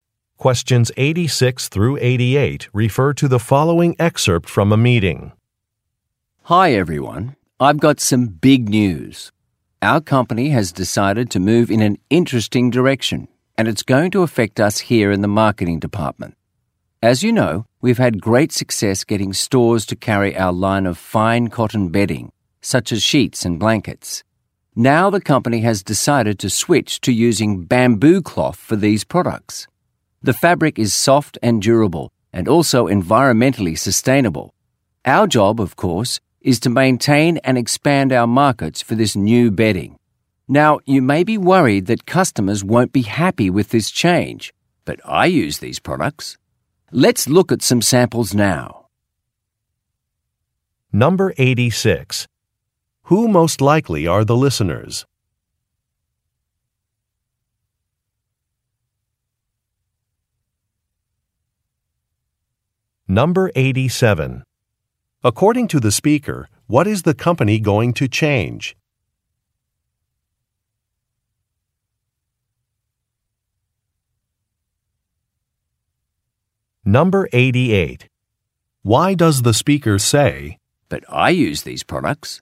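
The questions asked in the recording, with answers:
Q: Who most likely are the listeners?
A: Marketing employees

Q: According to the speaker, what is the company going to change?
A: The material of its bedding products (switching from cotton to bamboo cloth)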